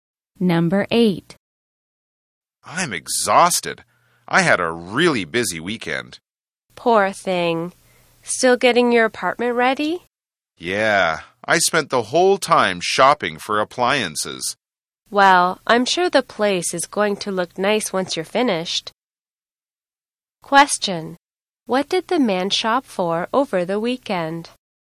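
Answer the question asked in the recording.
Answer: Appliances for his apartment.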